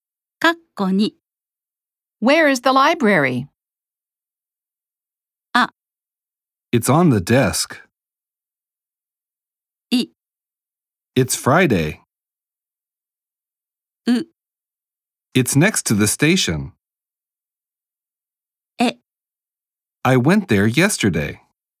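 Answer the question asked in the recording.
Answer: う: It's next to the station.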